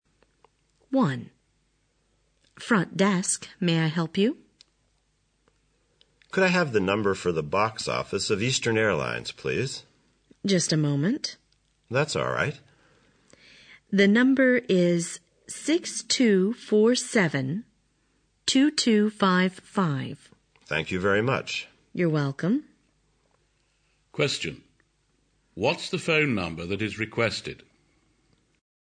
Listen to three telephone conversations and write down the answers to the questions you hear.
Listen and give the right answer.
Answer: 6247-2255